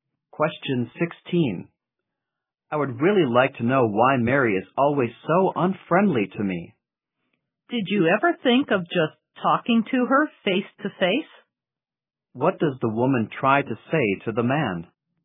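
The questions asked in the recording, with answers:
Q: What does the woman try to say to the man?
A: He should talk to Mary face to face.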